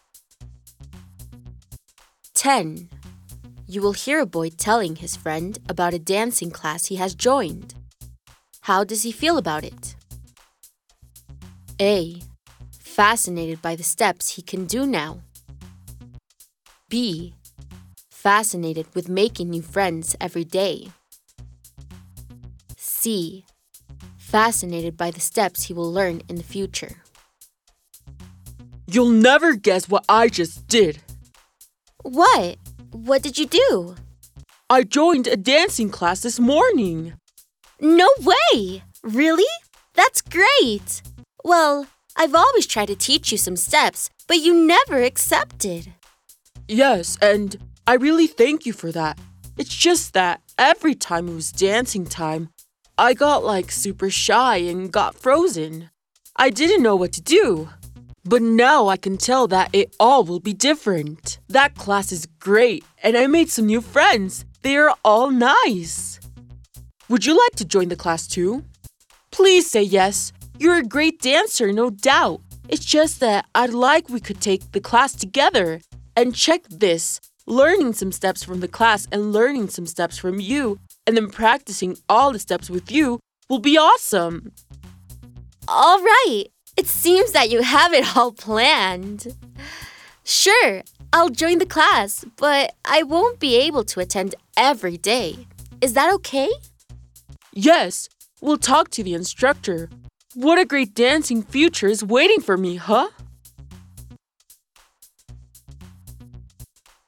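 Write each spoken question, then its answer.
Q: How does he feel about it?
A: C: Fascinated by the steps he will learn in the future.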